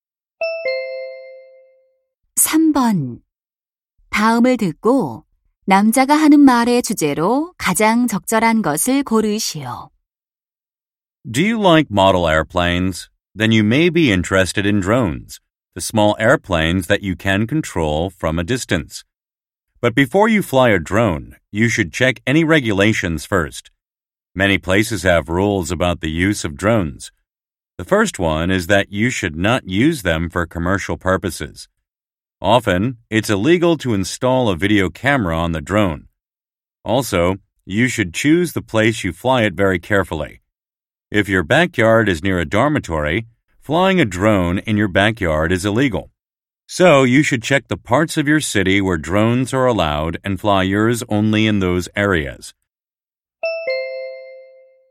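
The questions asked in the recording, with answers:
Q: 다음을 듣고 남자가 하는 말의 주제로 가장 적절한 것을 고르시오.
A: 드론 비행 전 규정 확인의 필요성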